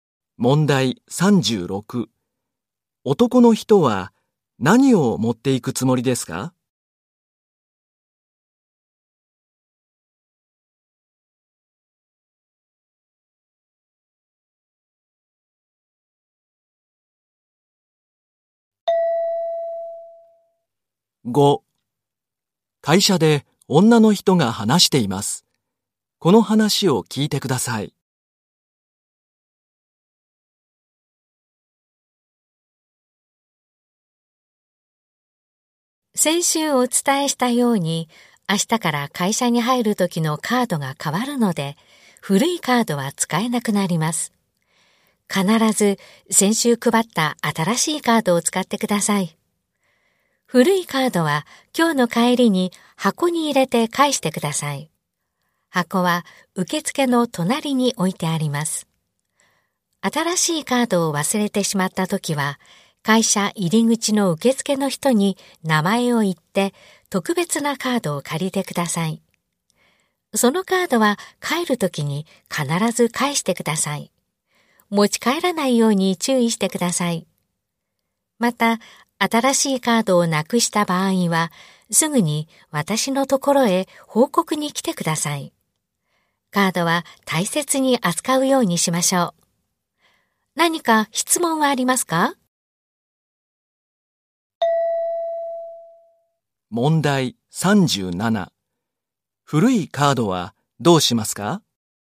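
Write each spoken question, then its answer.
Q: 古いカードはどうしますか?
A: 今日の帰りに受付の隣の箱に入れて返す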